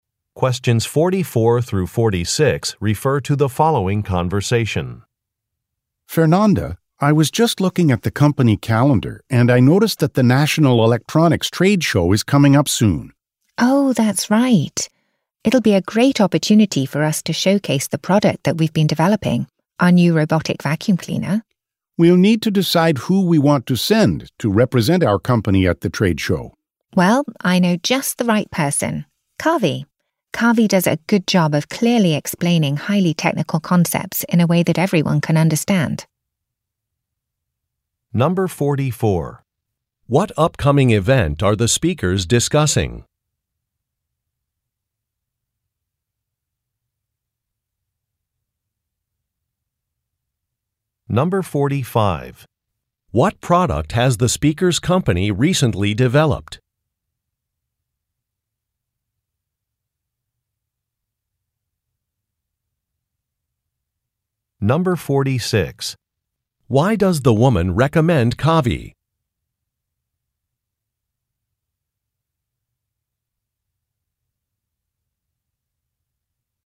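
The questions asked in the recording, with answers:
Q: What upcoming event are the speakers discussing?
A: The National Electronics Trade Show

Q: What product has the speaker's company recently developed?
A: A robotic vacuum cleaner

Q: Why does the woman recommend Kavi?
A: He clearly explains highly technical concepts in a way everyone can understand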